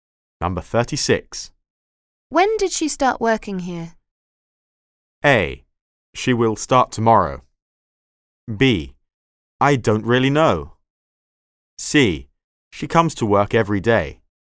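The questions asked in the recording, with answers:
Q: When did she start working here?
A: B: I don't really know.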